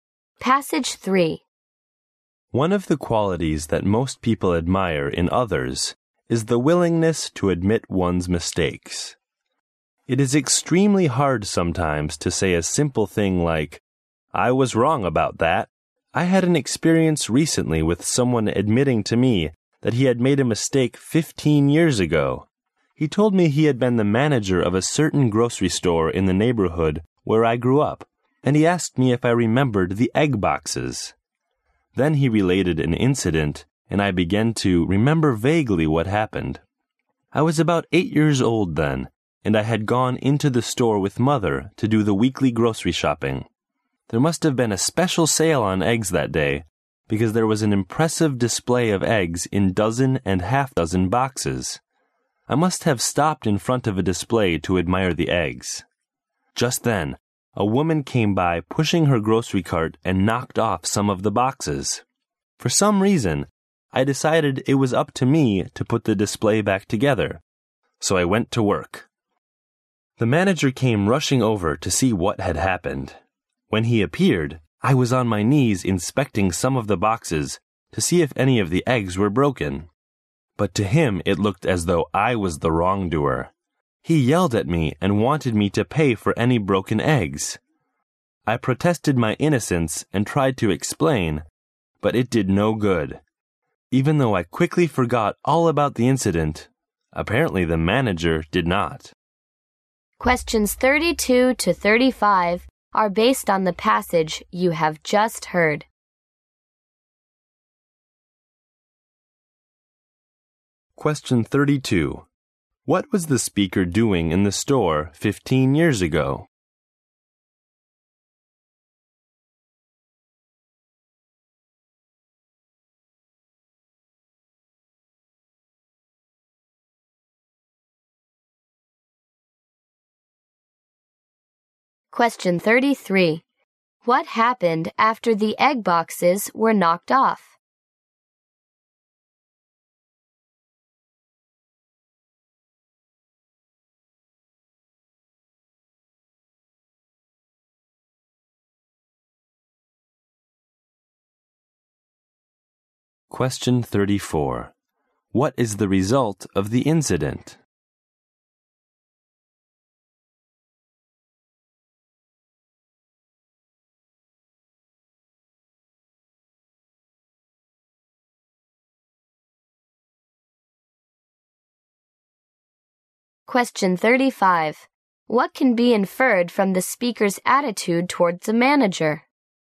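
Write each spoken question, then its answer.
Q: What was the speaker doing in the store 15 years ago?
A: Doing the weekly grocery shopping with his mother.

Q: What happened after the egg boxes were knocked off?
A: The speaker tried to put the display back, and the manager thought he had done it.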